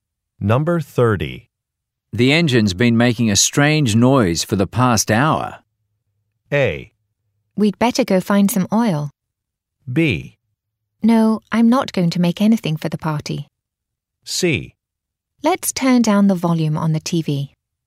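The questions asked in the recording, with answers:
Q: The engine's been making a strange noise for the past hour.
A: A: We'd better go find some oil.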